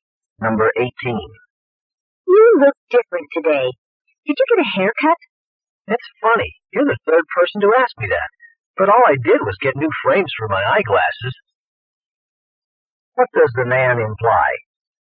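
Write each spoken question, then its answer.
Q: What does the man imply?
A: He didn't get a haircut; only his eyeglass frames are new.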